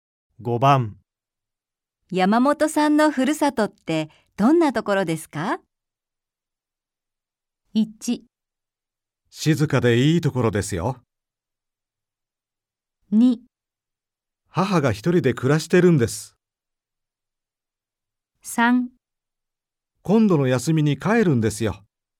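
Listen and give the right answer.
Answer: 1: 静かでいいところですよ。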